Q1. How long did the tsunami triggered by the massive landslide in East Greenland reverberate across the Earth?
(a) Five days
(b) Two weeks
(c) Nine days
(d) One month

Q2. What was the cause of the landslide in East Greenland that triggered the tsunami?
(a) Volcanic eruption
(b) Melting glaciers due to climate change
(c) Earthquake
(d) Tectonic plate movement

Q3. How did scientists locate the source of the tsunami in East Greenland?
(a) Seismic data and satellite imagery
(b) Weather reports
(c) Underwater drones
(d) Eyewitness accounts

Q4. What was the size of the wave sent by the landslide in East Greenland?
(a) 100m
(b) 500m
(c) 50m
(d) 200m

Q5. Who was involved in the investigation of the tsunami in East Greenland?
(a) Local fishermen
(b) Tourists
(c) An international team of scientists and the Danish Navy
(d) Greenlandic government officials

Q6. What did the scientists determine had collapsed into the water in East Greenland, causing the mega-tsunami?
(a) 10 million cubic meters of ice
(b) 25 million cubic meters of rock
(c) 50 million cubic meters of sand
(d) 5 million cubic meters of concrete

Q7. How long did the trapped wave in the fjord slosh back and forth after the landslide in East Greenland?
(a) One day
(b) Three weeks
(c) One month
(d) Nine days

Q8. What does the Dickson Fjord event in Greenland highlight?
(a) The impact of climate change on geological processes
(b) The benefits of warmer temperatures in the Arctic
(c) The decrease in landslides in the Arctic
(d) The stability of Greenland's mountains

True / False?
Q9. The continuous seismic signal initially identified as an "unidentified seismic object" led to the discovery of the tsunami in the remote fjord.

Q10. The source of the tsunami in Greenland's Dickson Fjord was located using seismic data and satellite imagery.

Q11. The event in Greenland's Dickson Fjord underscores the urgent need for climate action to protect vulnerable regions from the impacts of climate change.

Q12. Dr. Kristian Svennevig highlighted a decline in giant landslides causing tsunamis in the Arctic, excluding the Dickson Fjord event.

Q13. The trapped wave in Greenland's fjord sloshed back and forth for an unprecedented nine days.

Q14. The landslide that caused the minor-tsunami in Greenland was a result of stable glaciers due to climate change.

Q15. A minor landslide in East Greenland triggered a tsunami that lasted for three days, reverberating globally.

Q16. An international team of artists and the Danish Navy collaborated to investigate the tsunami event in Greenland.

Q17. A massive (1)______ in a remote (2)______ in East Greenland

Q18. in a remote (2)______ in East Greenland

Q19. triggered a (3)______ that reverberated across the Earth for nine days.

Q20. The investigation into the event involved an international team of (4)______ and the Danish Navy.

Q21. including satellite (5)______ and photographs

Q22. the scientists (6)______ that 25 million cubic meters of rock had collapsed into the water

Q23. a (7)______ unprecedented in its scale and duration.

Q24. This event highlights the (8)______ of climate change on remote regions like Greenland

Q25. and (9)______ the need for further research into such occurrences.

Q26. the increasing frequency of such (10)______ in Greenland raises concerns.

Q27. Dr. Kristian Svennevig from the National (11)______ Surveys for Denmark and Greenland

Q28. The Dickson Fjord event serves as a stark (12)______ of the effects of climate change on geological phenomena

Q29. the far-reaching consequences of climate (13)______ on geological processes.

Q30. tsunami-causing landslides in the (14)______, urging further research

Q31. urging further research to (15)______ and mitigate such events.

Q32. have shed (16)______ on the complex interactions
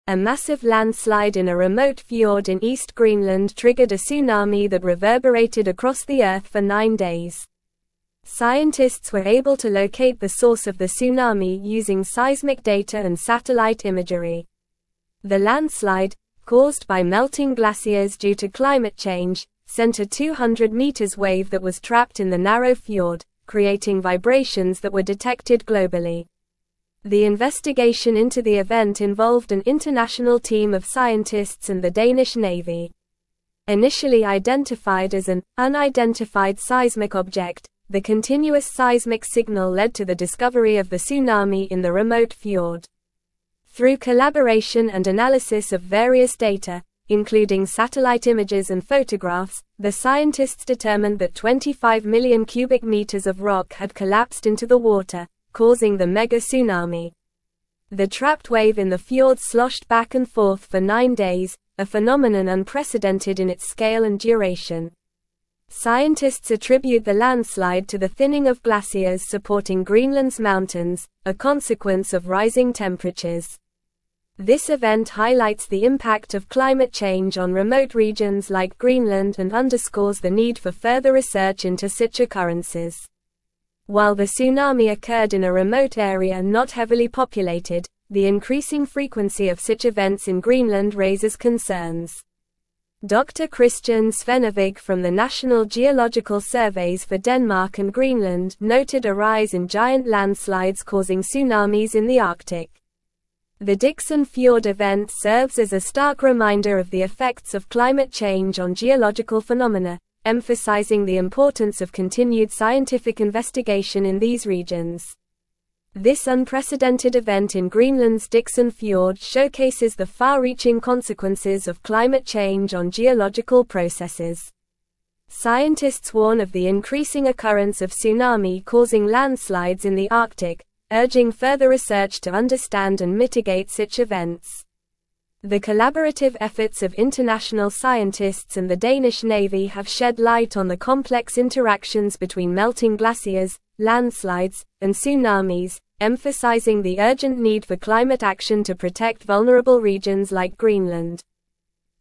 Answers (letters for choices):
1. c
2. b
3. a
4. d
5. c
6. b
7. d
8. a
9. True
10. True
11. True
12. False
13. True
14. False
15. False
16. False
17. landslide
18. fjord
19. tsunami
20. scientists
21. images
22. determined
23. phenomenon
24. impact
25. underscores
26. events
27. Geological
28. reminder
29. change
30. Arctic
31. understand
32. light

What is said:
A massive landslide in a remote fjord in East Greenland triggered a tsunami that reverberated across the Earth for nine days. Scientists were able to locate the source of the tsunami using seismic data and satellite imagery. The landslide, caused by melting glaciers due to climate change, sent a 200m wave that was trapped in the narrow fjord, creating vibrations that were detected globally.
The investigation into the event involved an international team of scientists and the Danish Navy. Initially identified as an "unidentified seismic object," the continuous seismic signal led to the discovery of the tsunami in the remote fjord. Through collaboration and analysis of various data, including satellite images and photographs, the scientists determined that 25 million cubic meters of rock had collapsed into the water, causing the mega-tsunami.
The trapped wave in the fjord sloshed back and forth for nine days, a phenomenon unprecedented in its scale and duration. Scientists attribute the landslide to the thinning of glaciers supporting Greenland's mountains, a consequence of rising temperatures. This event highlights the impact of climate change on remote regions like Greenland and underscores the need for further research into such occurrences.
While the tsunami occurred in a remote area not heavily populated, the increasing frequency of such events in Greenland raises concerns. Dr. Kristian Svennevig from the National Geological Surveys for Denmark and Greenland noted a rise in giant landslides causing tsunamis in the Arctic. The Dickson Fjord event serves as a stark reminder of the effects of climate change on geological phenomena, emphasizing the importance of continued scientific investigation in these regions.
This unprecedented event in Greenland's Dickson Fjord showcases the far-reaching consequences of climate change on geological processes. Scientists warn of the increasing occurrence of tsunami-causing landslides in the Arctic, urging further research to understand and mitigate such events. The collaborative efforts of international scientists and the Danish Navy have shed light on the complex interactions between melting glaciers, landslides, and tsunamis, emphasizing the urgent need for climate action to protect vulnerable regions like Greenland.

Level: Level 4